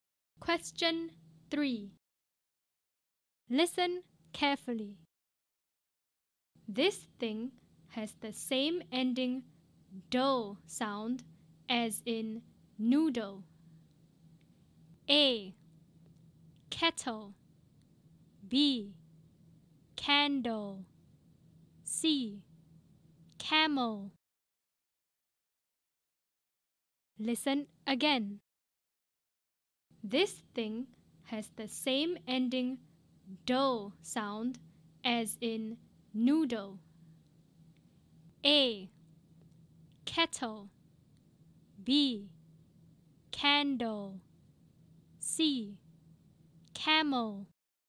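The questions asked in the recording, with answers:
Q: This thing has the same ending "dull" sound as in noodle.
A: B: Candle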